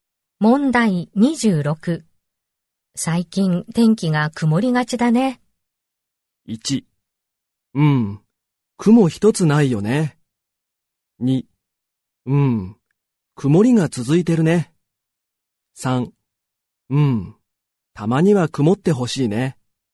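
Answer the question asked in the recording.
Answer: 2: うん、曇りが続いてるね。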